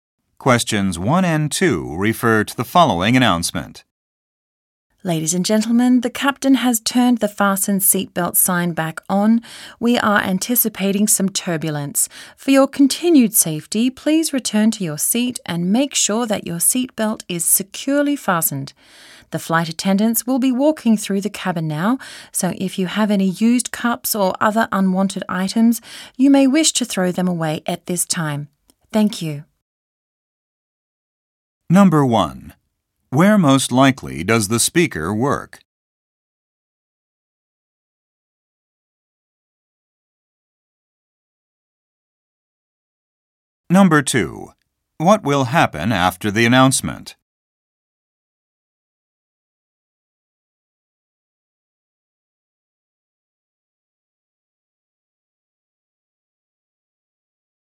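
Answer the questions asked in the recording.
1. On an airplane
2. Flight attendants will walk through the cabin to collect trash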